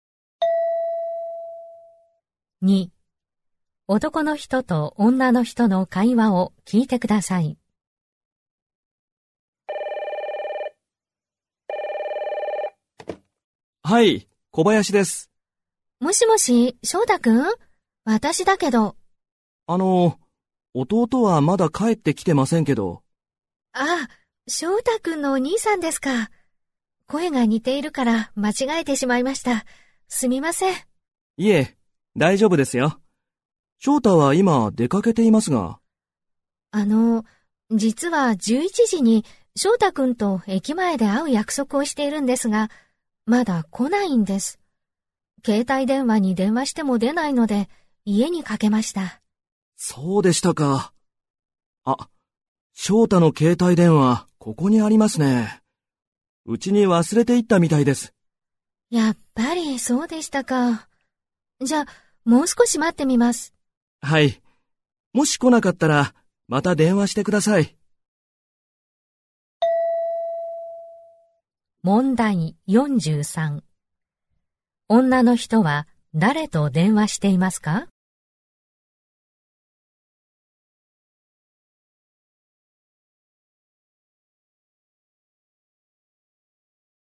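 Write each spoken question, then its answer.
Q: 女の人は誰と電話していますか?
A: 翔太くんのお兄さん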